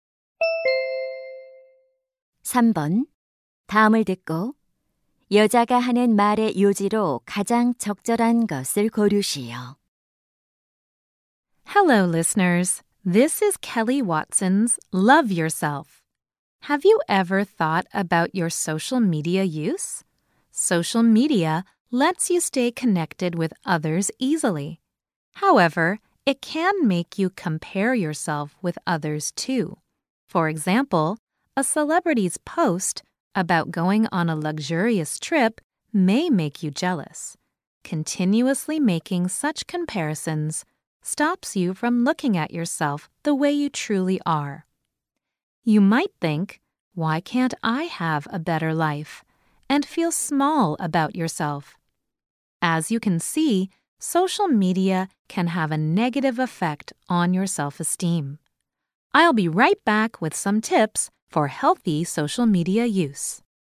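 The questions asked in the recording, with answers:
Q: 다음을 듣고 여자가 하는 말의 요지로 가장 적절한 것을 고르시오.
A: 소셜 미디어는 자존감에 부정적 영향을 줄 수 있다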